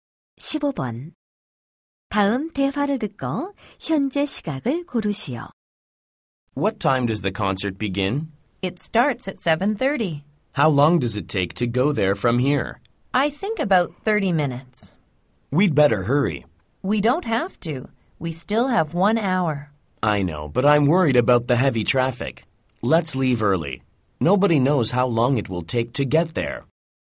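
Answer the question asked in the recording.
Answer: 6시 30분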